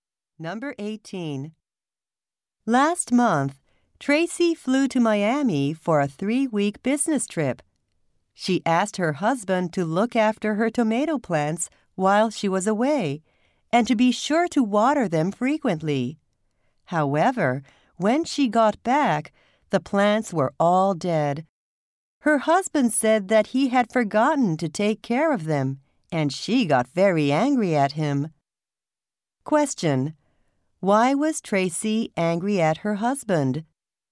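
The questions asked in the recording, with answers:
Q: Why was Tracy angry at her husband?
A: He forgot to take care of her tomato plants and they died.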